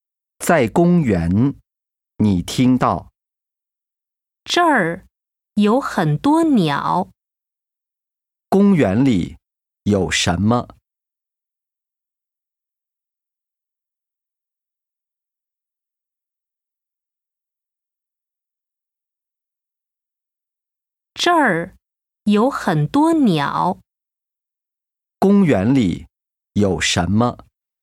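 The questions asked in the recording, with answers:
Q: 公园里有什么?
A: 很多鸟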